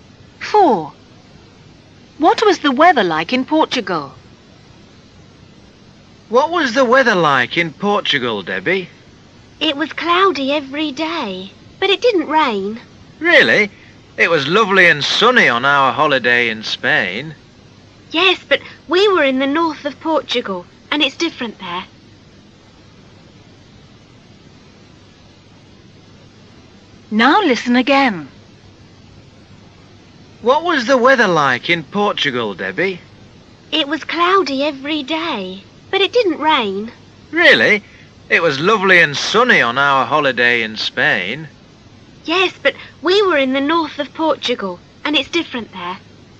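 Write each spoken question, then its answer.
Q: What was the weather like in Portugal?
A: Cloudy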